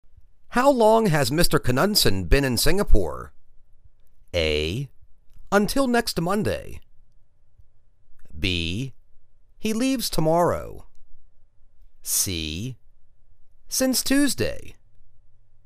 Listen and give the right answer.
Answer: Since Tuesday.